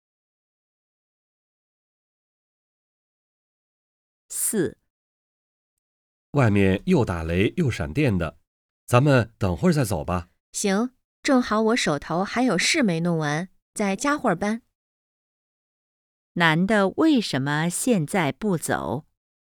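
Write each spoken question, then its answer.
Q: 男的为什么现在不走?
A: 外面打雷闪电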